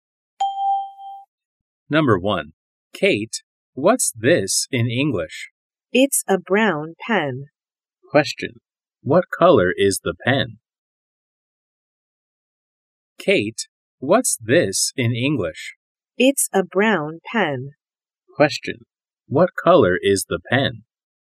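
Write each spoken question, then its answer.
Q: What color is the pen?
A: Brown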